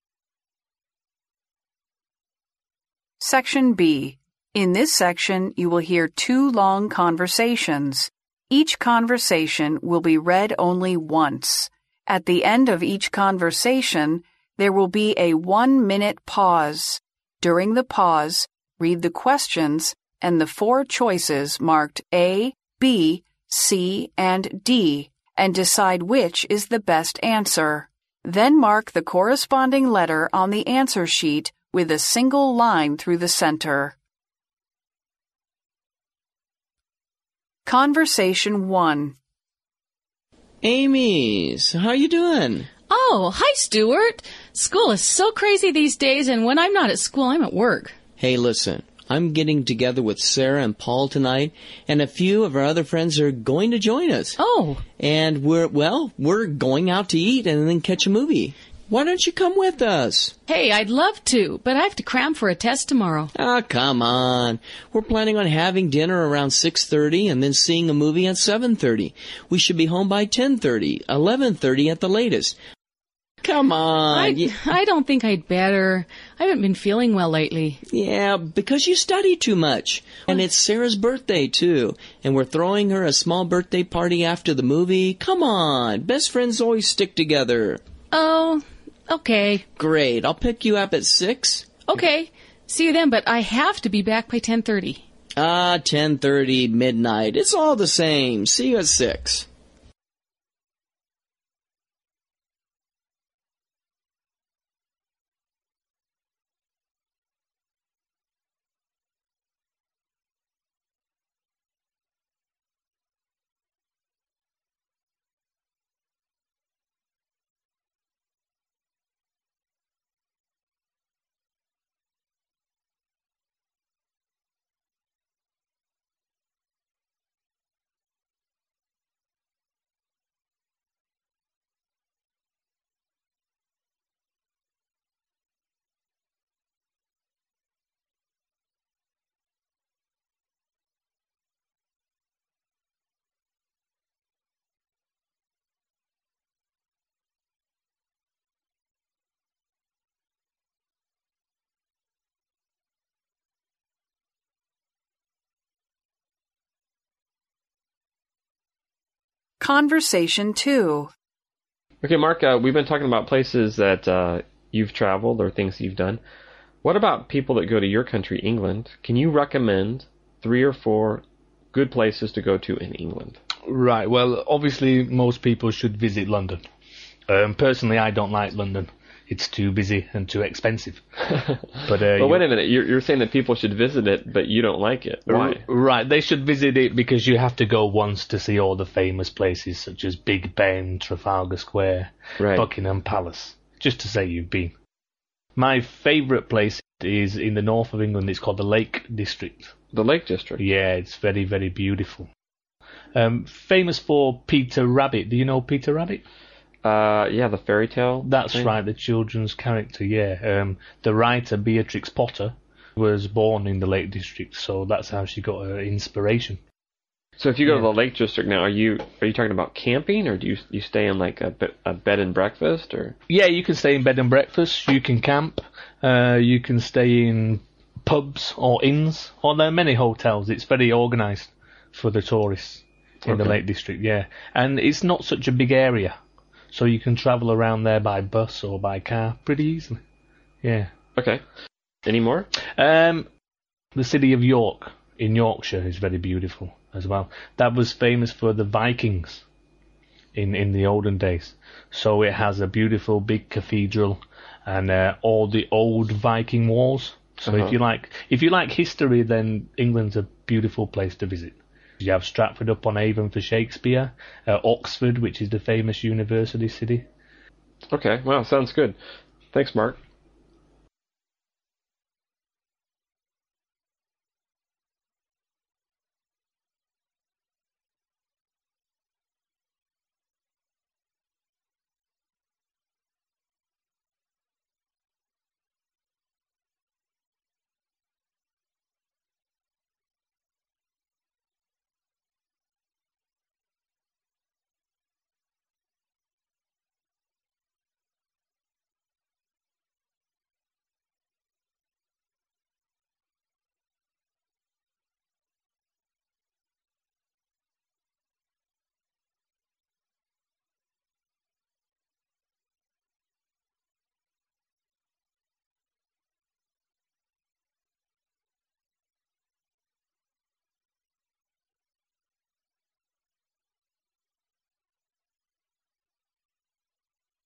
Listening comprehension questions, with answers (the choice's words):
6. What is Stuart planning to do with his friends?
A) Go for a drive and have a picnic.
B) Watch a football match.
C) See a movie and have dinner.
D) Go to the library and borrow some books.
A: See a movie and have dinner.

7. Why does Amy say she can't go with Stuart?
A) She has to study for an exam.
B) She has to do a part-time job.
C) She has to attend a party.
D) She has a lot of homework to do.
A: She has to study for an exam.

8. What are they going to do at the end of the evening?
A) Watch a video.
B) Have a party.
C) Play some games.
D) Have some coffee.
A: Have a party.

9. How is Amy going to the activity?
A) She's going to drive her car.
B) Sara is giving her a ride.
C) She's going to take the bus.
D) Stuart is giving her a ride.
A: Stuart is giving her a ride.

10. What time does Amy want to be home?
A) At 10:30 p.m.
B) At 11:00 p.m.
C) At 11:30 p.m.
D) At midnight.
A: At 10:30 p.m.

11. Why doesn't Mark like London?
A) There are always traffic jams.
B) It is too busy and things are not cheap.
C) The weather there is bad.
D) There are too many tourists all the year round.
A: It is too busy and things are not cheap.

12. What is Mark's favourite place in England?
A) Big Ben.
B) Trafalgar Square.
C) Buckingham Palace.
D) The Lake District.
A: The Lake District.

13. Who is Peter Rabbit?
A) He is a character in a fairy tale.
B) He is Beatrice Potter's son.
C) He was born in the Lake District.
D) He was from Yorkshire.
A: He is a character in a fairy tale.

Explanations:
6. 录音中开头部分,Stuart就提到"we're going out to eat and then catch a movie."并邀请Amy一起。由此可知,Stuart计划和朋友一起外出吃饭,并且看一场电影。C项正确。
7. 当Stuart邀请Amy一起参加活动时,Amy一开始给予了拒绝,"I'd love to, but I have to cram for a test tomorrow."由此可知,Amy得为明天的测试做准备。由此可知,A项正确。
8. 录音后面部分,Stuart提到"And it's Sara's birthday, too. And we're throwing her a small birthday party after the movie."由此可知,他们最后的一项活动是为Sara开生日派对。故选B项。
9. 录音后面部分,Amy最终同意了Stuart的邀请,之后Stuart对Amy说提到"I'll pick you up at 6:00."由此可知,Stuart会来接她。因此D项正确。
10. 录音最后,Amy对Stuart强调说,"See you then, but I have to be back by 10:30."由此可知,她想在十点半的时候回家。因此A项正确。
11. 录音中Mark一开始就提到"Personally, I don't like London. It's too busy and too expensive."由此可知,Mark认为伦敦太繁忙,花销太大。因此选B项。
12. 录音中Mark提到"My favourite place is in the North of England. It's called the Lake District."由此可知,他最喜欢的地方是湖区。故选D项。
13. 录音中当Mark提到Peter Rabbit时,对方反应过来,"Yeah, the fairy tale."接着,Mark补充到,"That's right. The children's character."由此可知,Peter Rabbit是童话里的一个角色。故选A项。